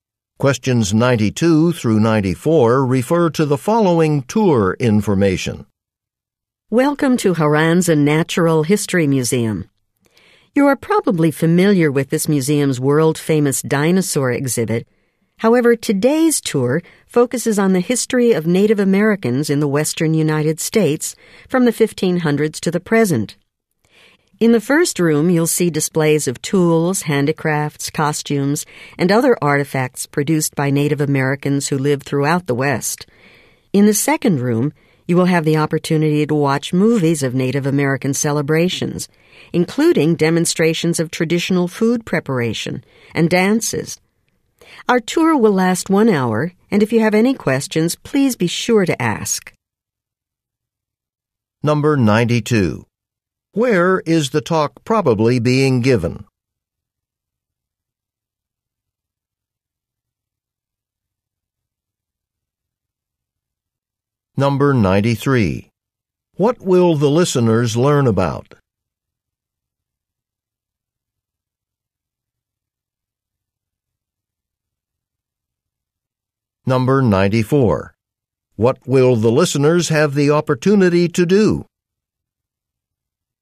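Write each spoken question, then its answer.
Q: Where is the talk probably being given?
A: At a natural history museum

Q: What will the listeners learn about?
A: The history of Native Americans in the western U.S.

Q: What will the listeners have the opportunity to do?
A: Watch movies of Native American celebrations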